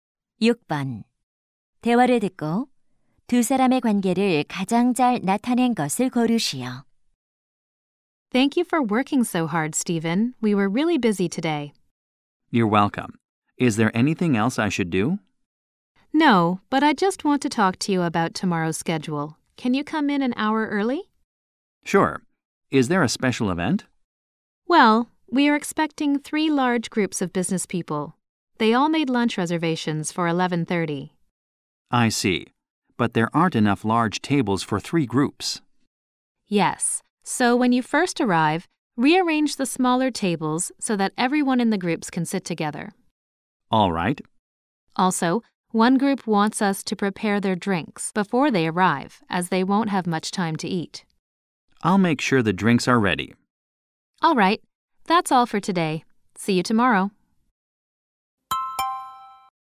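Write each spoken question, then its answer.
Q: 대화를 듣고 두 사람의 관계를 가장 잘 나타낸 것을 고르시오.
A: 식당 매니저 - 종업원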